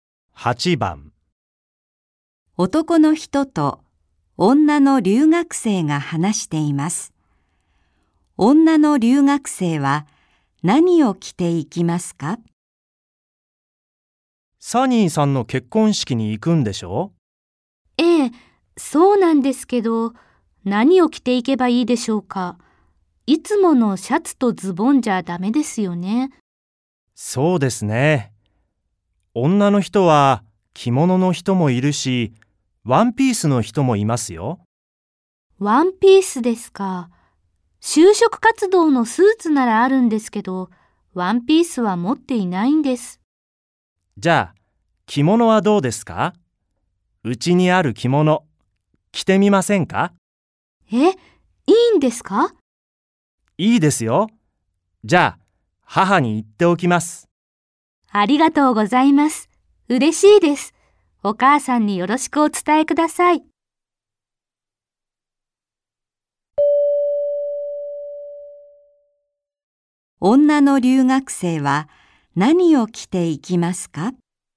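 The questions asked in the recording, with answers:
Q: 女の留学生は何を着ていきますか?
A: 着物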